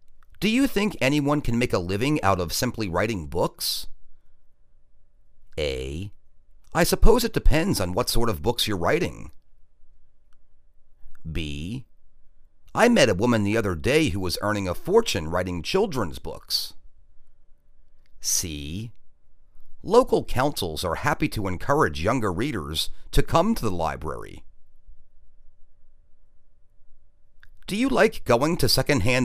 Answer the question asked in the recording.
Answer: I suppose it depends on what sort of books you're writing.